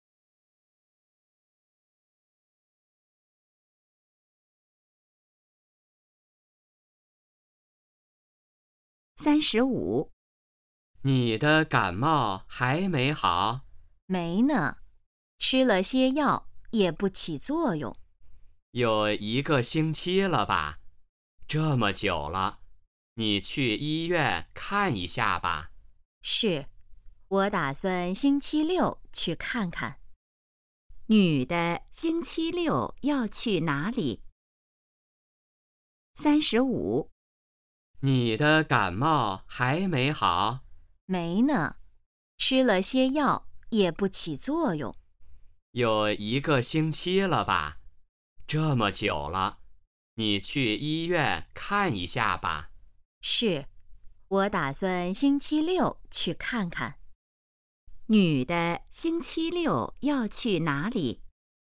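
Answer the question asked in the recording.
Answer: 医院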